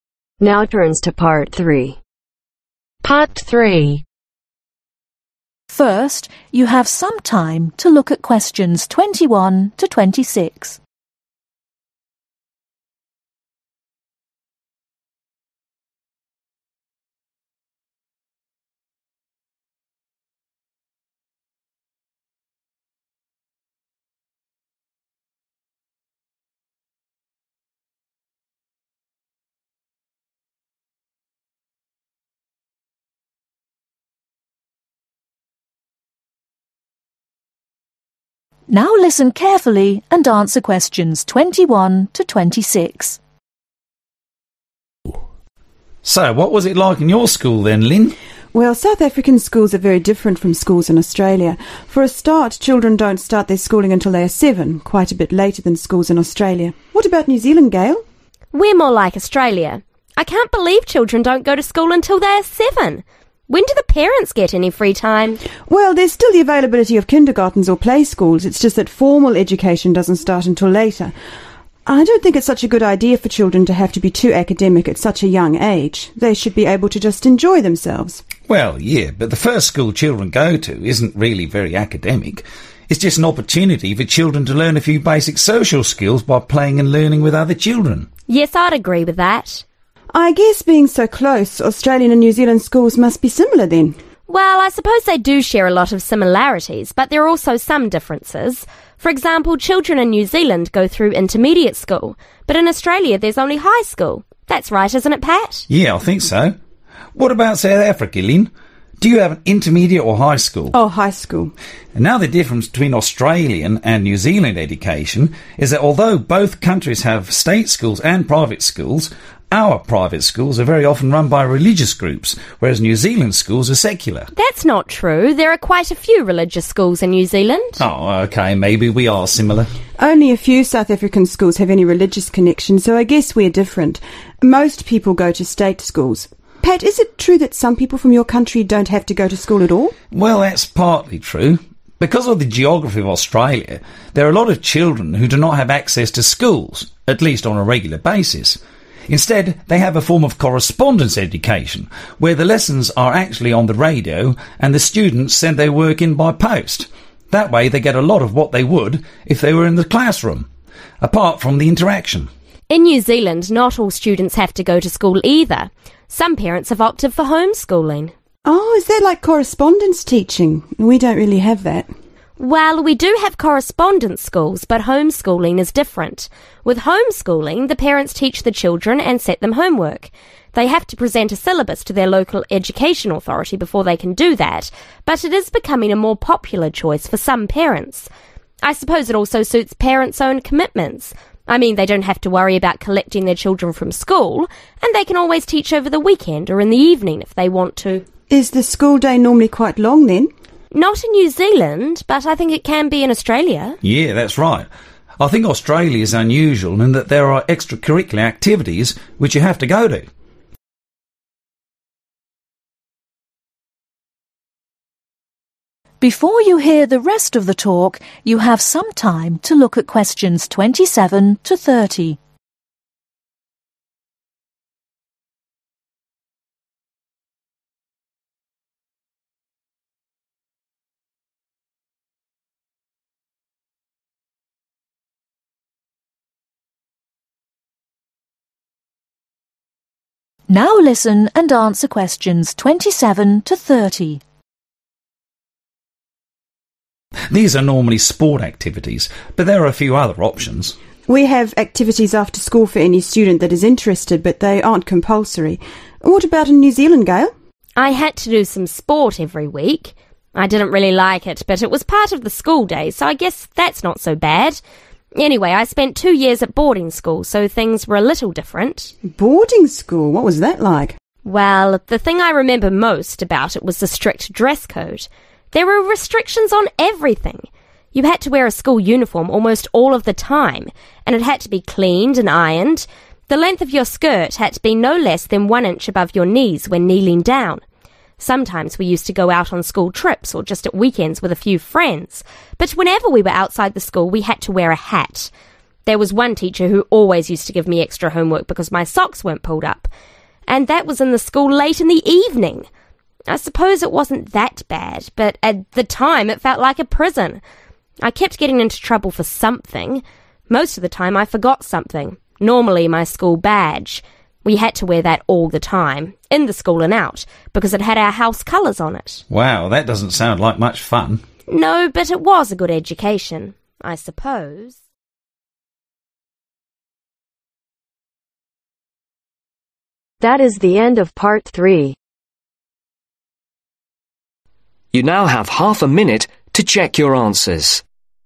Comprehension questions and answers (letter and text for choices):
Circle the correct letters A-C.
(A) South Africa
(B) Australia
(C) New Zealand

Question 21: Children start later ............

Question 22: Has intermediate school ............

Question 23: Few religious private schools ............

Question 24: Doesn't have correspondence education ............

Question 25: Home schooling ............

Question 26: Compulsory extracurricular activities ............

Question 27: Dress had to be one inch below the knee when (27)............ down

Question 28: A hat had to be worn at all times when outside the (28)............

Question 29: Socks had to be (29)............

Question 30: Your (30)............ had to be worn at all times.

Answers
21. (A) South Africa
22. (C) New Zealand
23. (A) South Africa
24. (A) South Africa
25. (C) New Zealand
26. (B) Australia
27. Kneeling
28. School
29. Pulled up
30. School badge